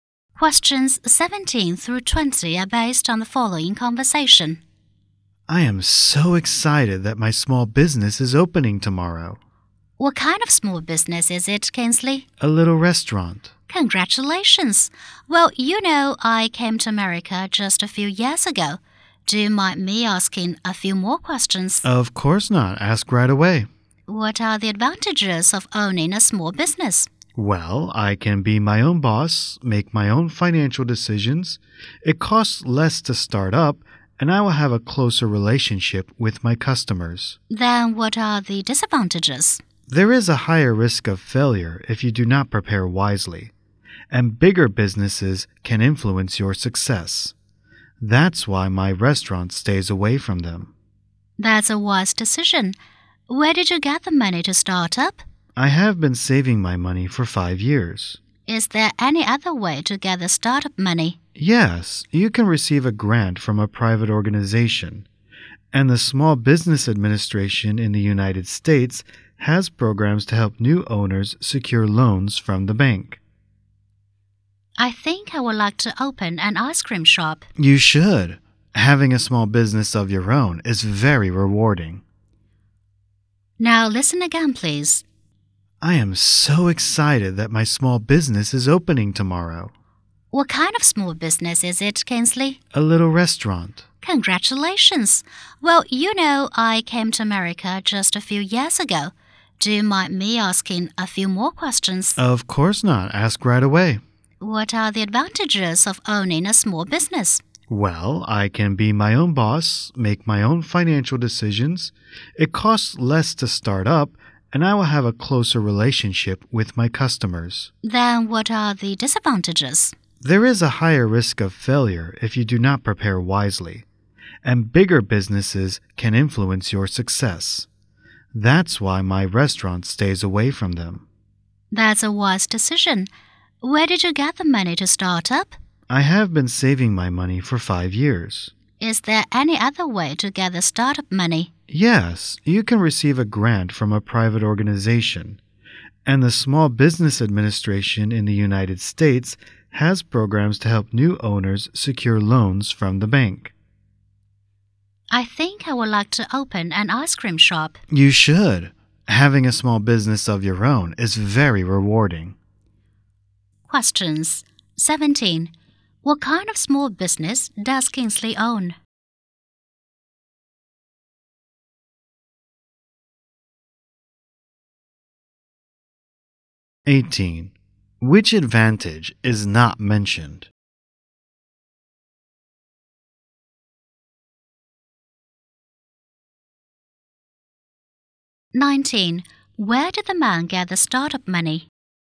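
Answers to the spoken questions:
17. A little restaurant
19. From his own savings over 5 years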